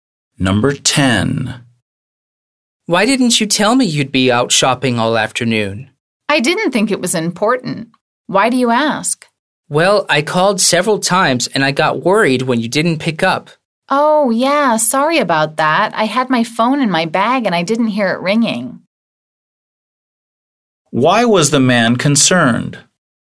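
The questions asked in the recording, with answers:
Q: Why was the man concerned?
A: He called her several times and she didn't pick up.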